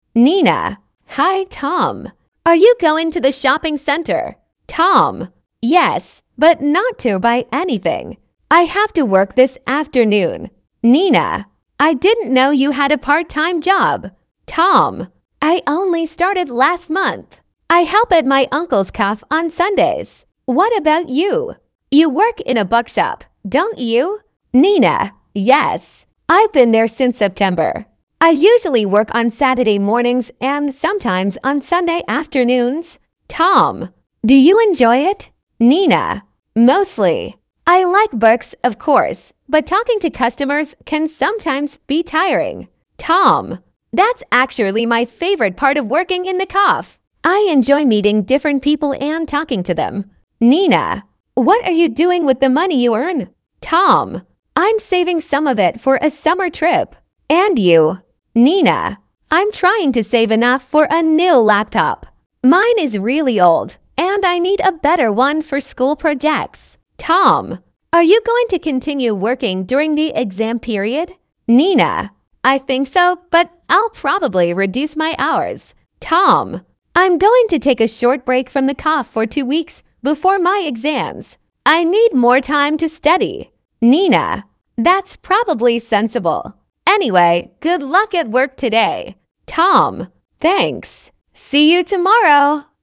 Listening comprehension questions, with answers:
Вы услышите диалог. Для каждого вопроса А–Е выберите один правильный вариант ответа из трёх предложенных (1, 2 или 3). Вы услышите запись дважды.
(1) Nina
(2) Tom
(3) Both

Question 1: Who has a part-time job?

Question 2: Who works on Saturdays?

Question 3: Who says that working with people is enjoyable?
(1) Nina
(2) Tom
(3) Neither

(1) Nina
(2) Tom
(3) Both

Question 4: Who is saving money for a new laptop?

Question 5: Who plans to stop working for a short time before exams?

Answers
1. (3) Both
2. (1) Nina
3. (2) Tom
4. (1) Nina
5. (2) Tom

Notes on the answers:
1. И Nina, и Tom имеют работу: Nina работает в книжном магазине, а Tom — в кафе своего дяди.
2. Nina говорит, что обычно работает по субботам утром.
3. Tom прямо говорит, что ему нравится встречаться и разговаривать с разными людьми.
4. Nina откладывает деньги на новый ноутбук.
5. Tom собирается сделать двухнедельный перерыв перед экзаменами.

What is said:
Nina: Hi, Tom! Are you going to the shopping centre?
Tom: Yes, but not to buy anything. I have to work this afternoon.
Nina: I didn't know you had a part-time job.
Tom: I only started last month. I help at my uncle's café on Sundays. What about you? You work in a bookshop, don't you?
Nina: Yes. I've been there since September. I usually work on Saturday mornings and sometimes on Sunday afternoons.
Tom: Do you enjoy it?
Nina: Mostly. I like books, of course, but talking to customers can sometimes be tiring.
Tom: That's actually my favourite part of working in the café. I enjoy meeting different people and talking to them.
Nina: What are you doing with the money you earn?
Tom: I'm saving some of it for a summer trip. And you?
Nina: I'm trying to save enough for a new laptop. Mine is really old, and I need a better one for school projects.
Tom: Are you going to continue working during the exam period?
Nina: I think so, but I'll probably reduce my hours.
Tom: I'm going to take a short break from the café for two weeks before my exams. I need more time to study.
Nina: That's probably sensible. Anyway, good luck at work today!
Tom: Thanks! See you tomorrow.

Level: 10kl

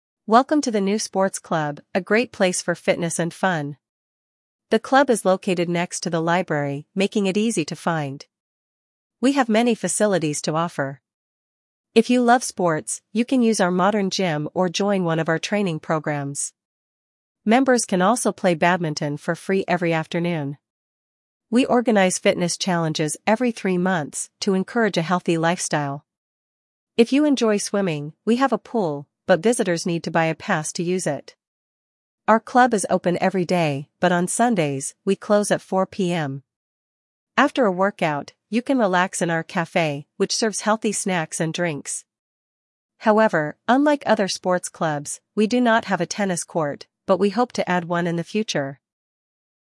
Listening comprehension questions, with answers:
1. Вы услышите сообщение. Для каждого предложения А–Е выберите один правильный вариант ответа из четырёх предложенных (1, 2, 3 или 4). Вы услышите запись дважды. При повторном прослушивании проверьте себя.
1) Where is the new sports club located?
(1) Near the main square.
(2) Next to the library.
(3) Behind the train station.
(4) Opposite the shopping center.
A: (2) Next to the library.

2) What is free for club members?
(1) Swimming lessons.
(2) Using the gym.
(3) Attending yoga classes.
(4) Playing badminton.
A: (4) Playing badminton.

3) How often do they organize fitness challenges?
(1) Once a week.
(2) Twice a month.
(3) Every three months.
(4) Once a year.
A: (3) Every three months.

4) What time does the club close on Sundays?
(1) 10 AM.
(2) 1 PM.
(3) 4 PM.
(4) 7 PM.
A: (3) 4 PM.

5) What is NOT available at the sports club?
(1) A tennis court.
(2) A swimming pool.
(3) A dance studio.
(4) A café.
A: (1) A tennis court.

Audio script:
«Welcome to the new sports club, a great place for fitness and fun! The club is located next to the library, making it easy to find.
We have many facilities to offer. If you love sports, you can use our modern gym or join one of our training programs. Members can also play badminton for free every afternoon.
We organize fitness challenges every three months to encourage a healthy lifestyle. If you enjoy swimming, we have a pool, but visitors need to buy a pass to use it.
Our club is open every day, but on Sundays, we close at 4 PM. After a workout, you can relax in our café, which serves healthy snacks and drinks.
However, unlike other sports clubs, we do not have a tennis court, but we hope to add one in the future!»

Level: 8 класс

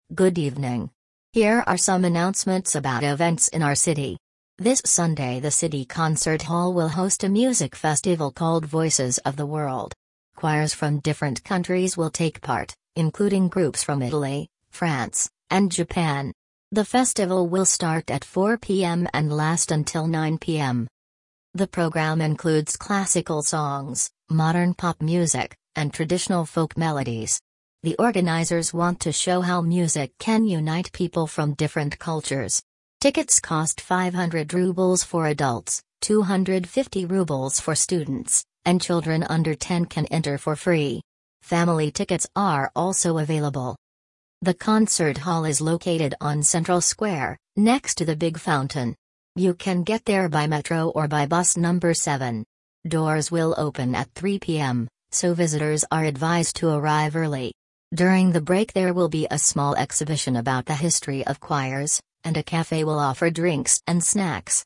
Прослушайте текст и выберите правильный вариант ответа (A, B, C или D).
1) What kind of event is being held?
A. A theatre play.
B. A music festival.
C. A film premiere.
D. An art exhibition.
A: B. A music festival.

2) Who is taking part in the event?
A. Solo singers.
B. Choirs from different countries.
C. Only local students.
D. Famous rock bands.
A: B. Choirs from different countries.

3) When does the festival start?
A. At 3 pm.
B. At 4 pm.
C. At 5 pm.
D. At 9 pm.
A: B. At 4 pm.

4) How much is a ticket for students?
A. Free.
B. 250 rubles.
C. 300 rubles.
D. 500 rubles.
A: B. 250 rubles.

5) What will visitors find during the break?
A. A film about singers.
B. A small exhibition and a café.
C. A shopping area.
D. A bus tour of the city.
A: B. A small exhibition and a café.

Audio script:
Good evening! Here are some announcements about events in our city. This Sunday the City Concert Hall will host a music festival called Voices of the World. Choirs from different countries will take part, including groups from Italy, France, and Japan. The festival will start at 4 pm and last until 9 pm.
The programme includes classical songs, modern pop music, and traditional folk melodies. The organisers want to show how music can unite people from different cultures. Tickets cost 500 rubles for adults, 250 rubles for students, and children under 10 can enter for free. Family tickets are also available.
The Concert Hall is located on Central Square, next to the big fountain. You can get there by metro or by bus number 7. Doors will open at 3 pm, so visitors are advised to arrive early. During the break there will be a small exhibition about the history of choirs, and a café will offer drinks and snacks.

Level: 8 класс

